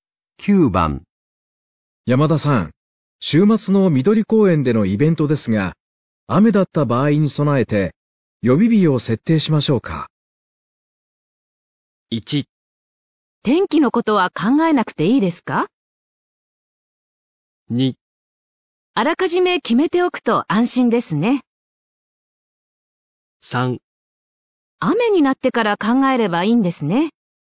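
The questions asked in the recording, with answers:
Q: 山田さん、週末の緑公園でのイベントですが、雨だった場合に備えて予備日を設定しましょうか。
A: 2: あらかじめ決めておくと安心ですね。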